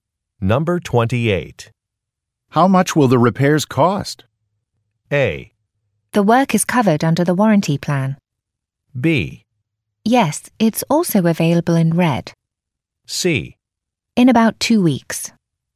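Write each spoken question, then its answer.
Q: How much will the repairs cost?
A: A: The work is covered under the warranty plan.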